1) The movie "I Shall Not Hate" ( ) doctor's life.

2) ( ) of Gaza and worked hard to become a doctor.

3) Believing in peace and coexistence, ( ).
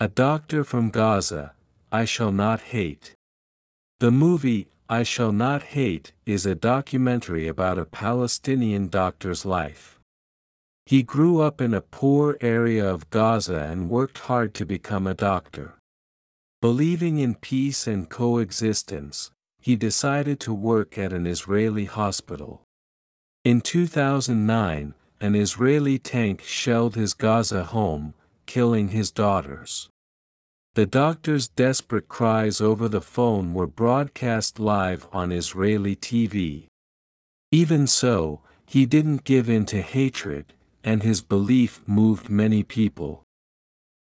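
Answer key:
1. is a documentary about a Palestinian
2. He grew up in a poor area
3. he decided to work at an Israeli hospital

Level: 中級脱出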